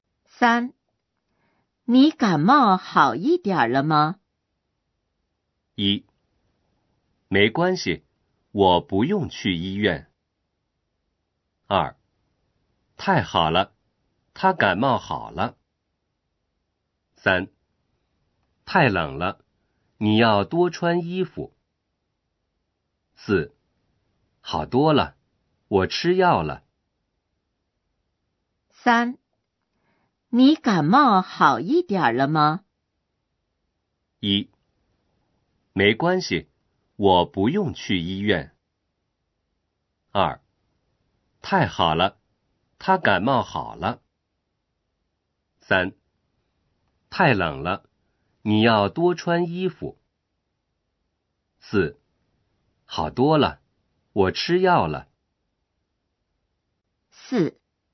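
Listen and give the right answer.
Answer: 4: 好多了,我吃药了。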